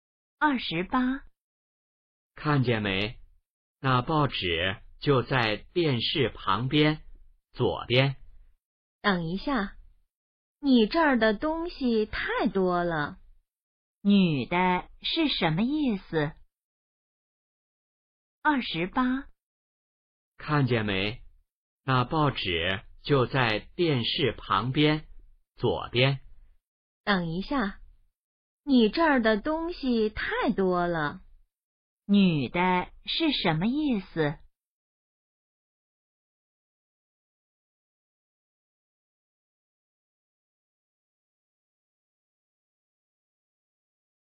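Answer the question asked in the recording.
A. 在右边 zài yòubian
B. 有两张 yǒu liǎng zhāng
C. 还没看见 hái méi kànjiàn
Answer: C. 还没看见 hái méi kànjiàn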